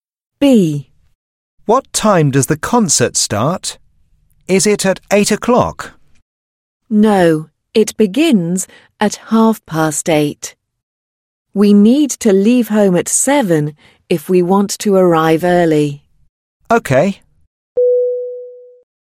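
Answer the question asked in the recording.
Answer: At 8:30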